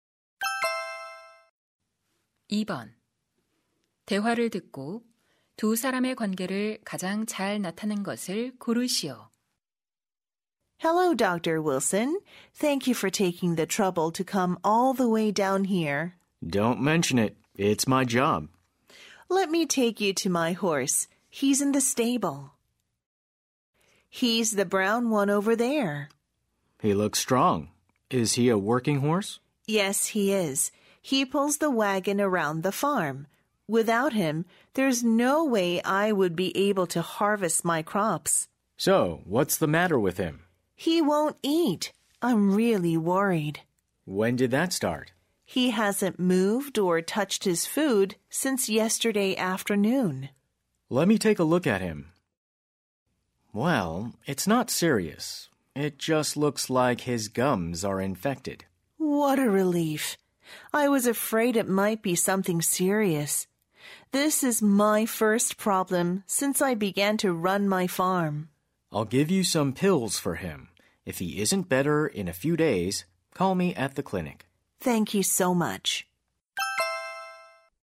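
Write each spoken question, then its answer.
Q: 대화를 듣고 두 사람의 관계를 가장 잘 나타낸 것을 고르시오.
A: 수의사 - 농장 주인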